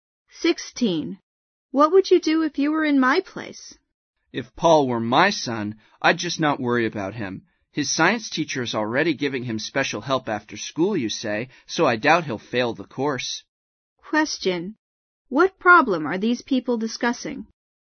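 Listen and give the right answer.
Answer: Whether Paul will fail his science course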